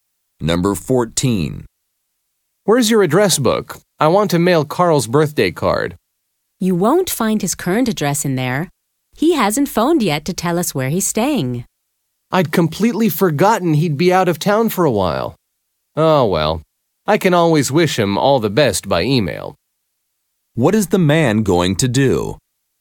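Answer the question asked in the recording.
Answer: Send Carl an email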